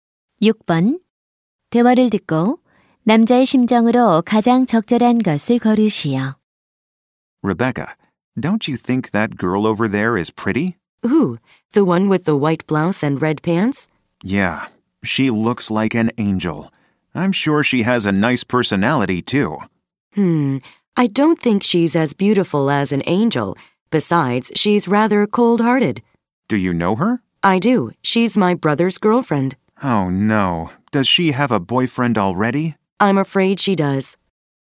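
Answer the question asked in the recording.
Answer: 실망한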